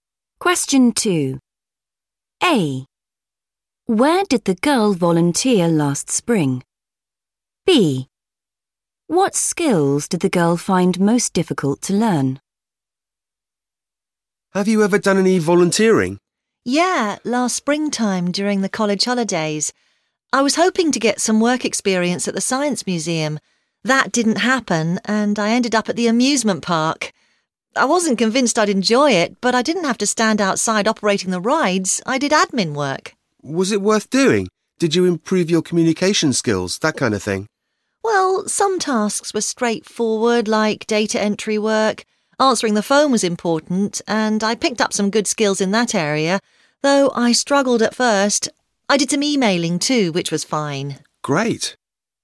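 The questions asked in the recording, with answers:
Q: Where did the girl volunteer last spring?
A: amusement park

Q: What skills did the girl find most difficult to learn?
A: answering the phone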